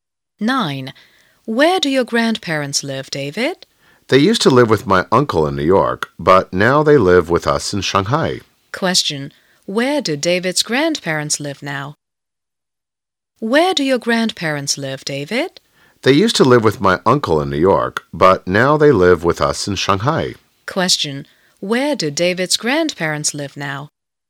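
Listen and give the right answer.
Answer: In Shanghai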